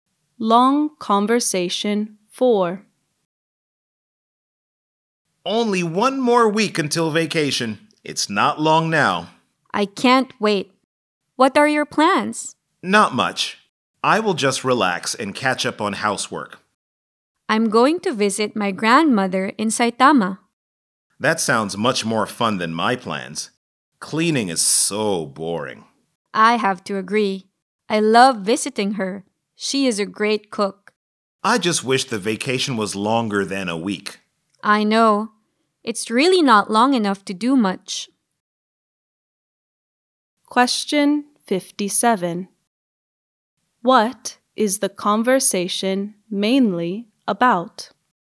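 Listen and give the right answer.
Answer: Their plans for the vacation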